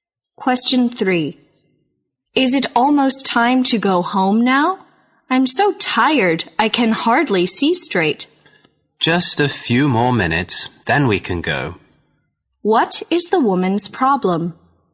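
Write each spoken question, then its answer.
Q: What is the woman's problem?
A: She is very tired.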